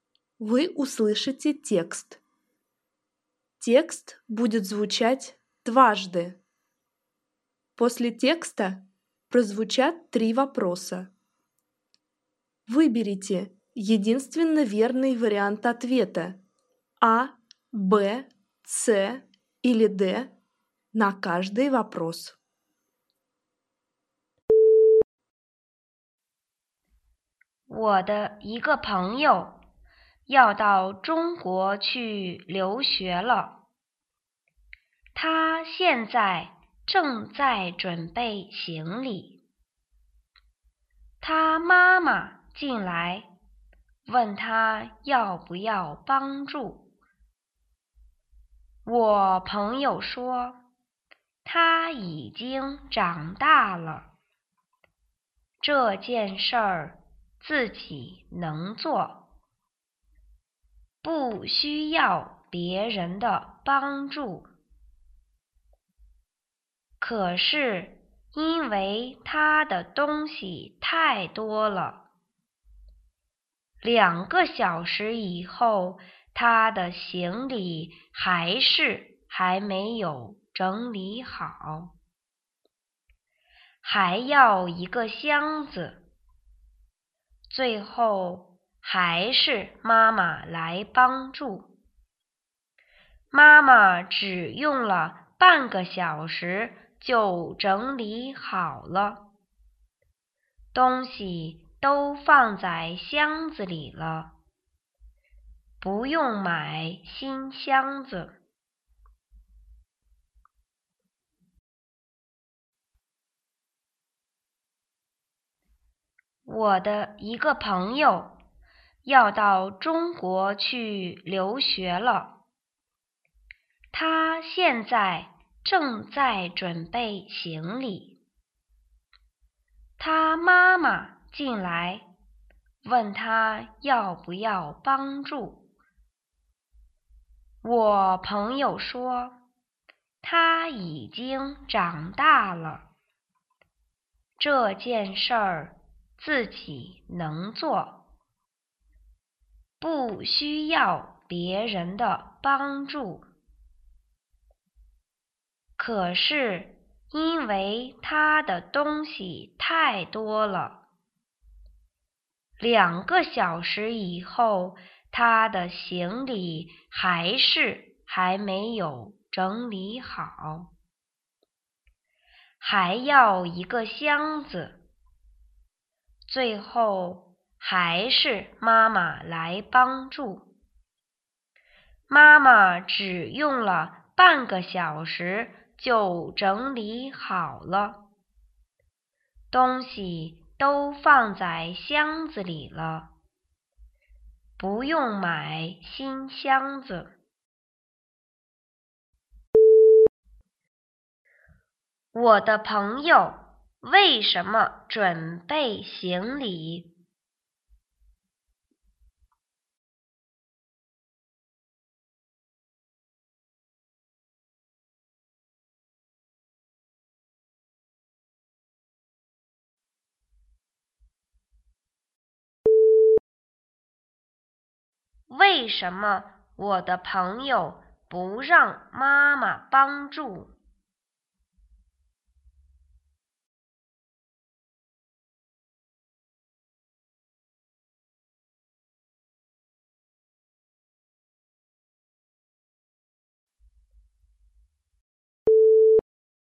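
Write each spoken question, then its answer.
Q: 我的朋友为什么准备行李?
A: 要到中国去留学

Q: 为什么我的朋友不让妈妈帮助?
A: 他觉得自己已经长大了,能自己做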